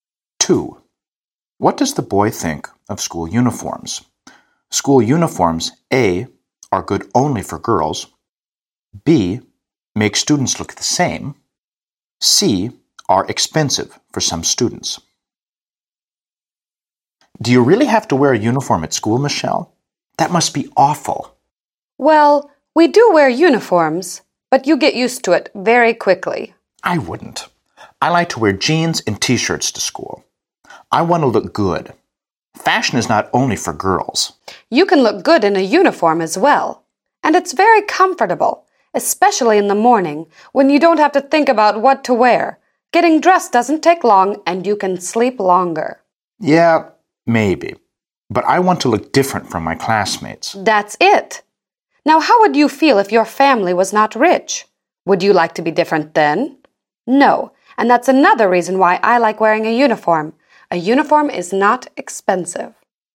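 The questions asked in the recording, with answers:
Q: What does the boy think of school uniforms?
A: B: make students look the same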